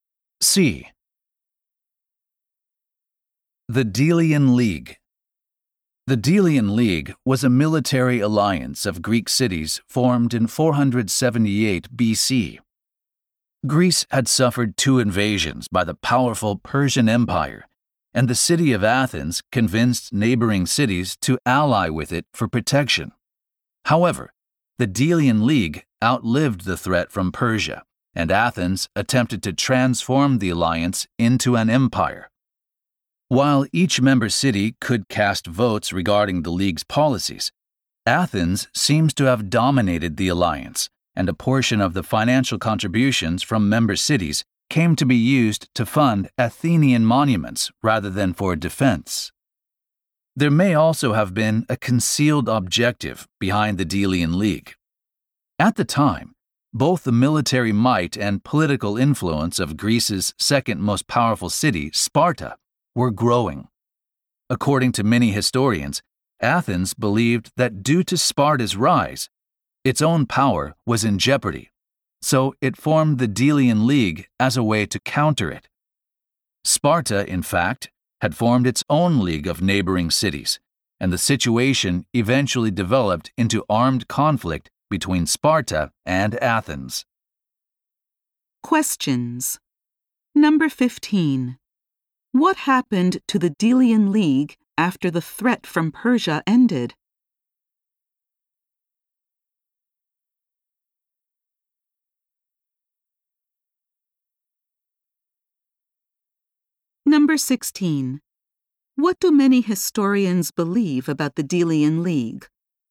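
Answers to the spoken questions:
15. Athens tried to turn it into an empire and used members' contributions to fund Athenian monuments.
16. Athens formed it to counter Sparta's rising power.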